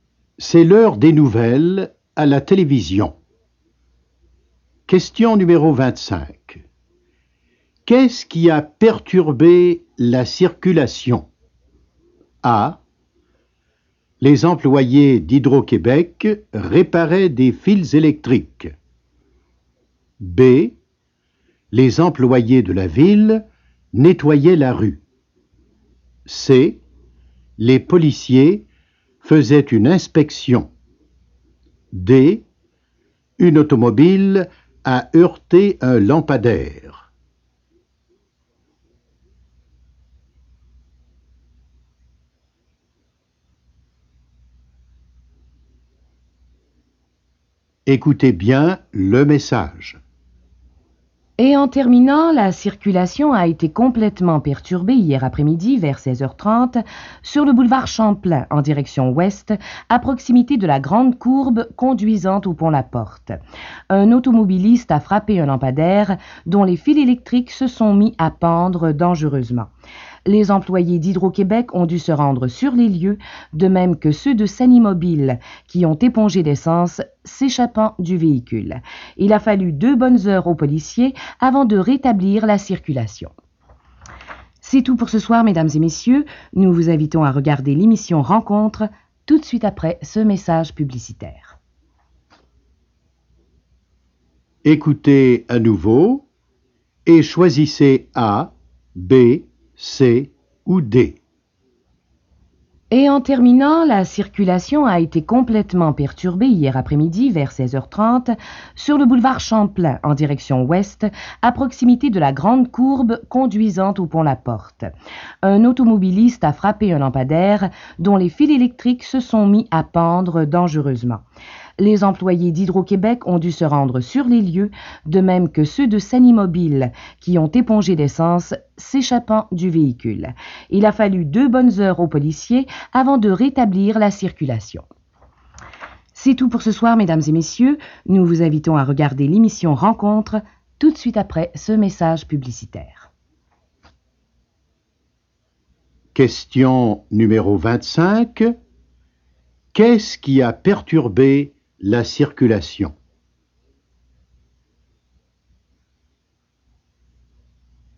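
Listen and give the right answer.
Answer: D: Une automobile a heurté un lampadaire.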